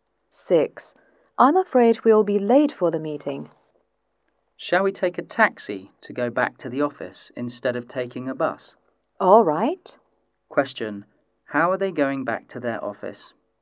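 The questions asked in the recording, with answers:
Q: How are they going back to their office?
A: By taxi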